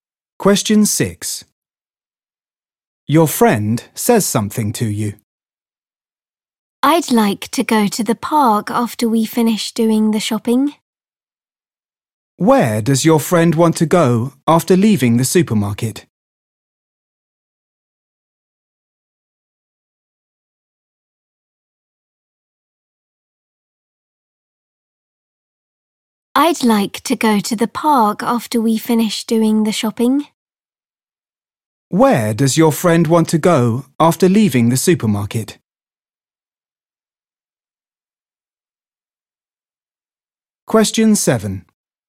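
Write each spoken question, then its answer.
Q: Where does your friend want to go after leaving the supermarket?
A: the park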